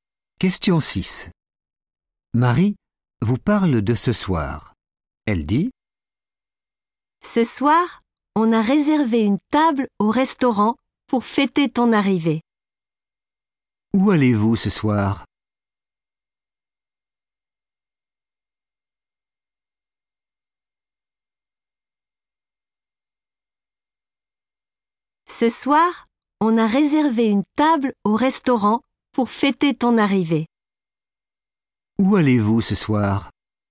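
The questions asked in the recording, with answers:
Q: Où allez-vous ce soir ?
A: au restaurant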